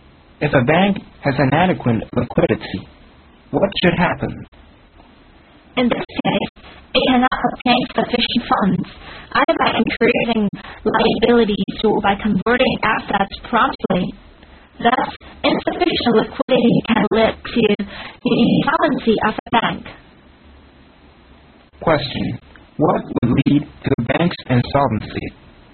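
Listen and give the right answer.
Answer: Insufficient liquidity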